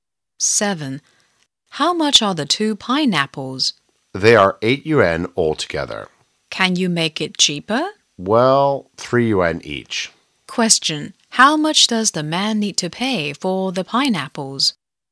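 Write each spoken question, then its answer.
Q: how much does the man need to pay for the pineapples?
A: 6 yuan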